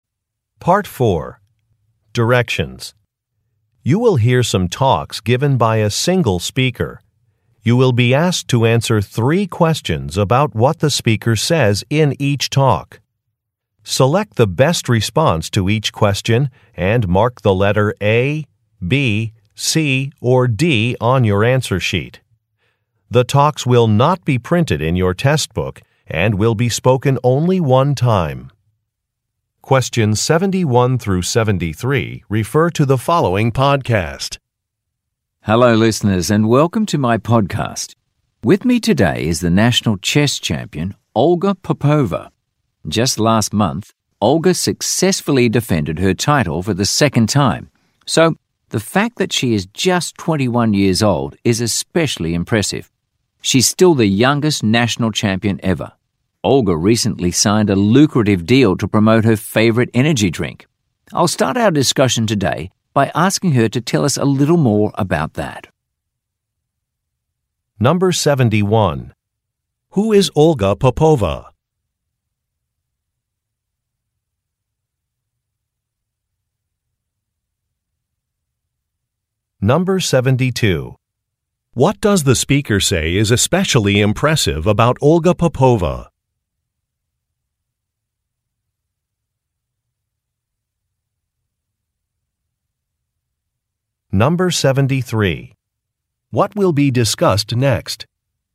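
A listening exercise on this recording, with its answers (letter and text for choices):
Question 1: Who is Olga Popova?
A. A video game designer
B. A chess player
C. A swimmer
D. An actor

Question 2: What does the speaker say is especially impressive about Olga Popova?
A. Her young age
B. Her communication skills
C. Her educational background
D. Her volunteer activities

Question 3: What will be discussed next?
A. Training strategies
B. A sponsorship agreement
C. Equipment recommendations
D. A recent trip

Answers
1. B. A chess player
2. A. Her young age
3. B. A sponsorship agreement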